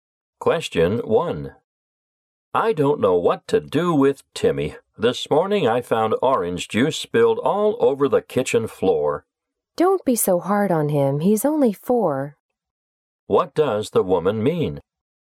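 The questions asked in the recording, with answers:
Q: What does the woman mean?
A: The man shouldn't be so hard on Timmy; he is only four.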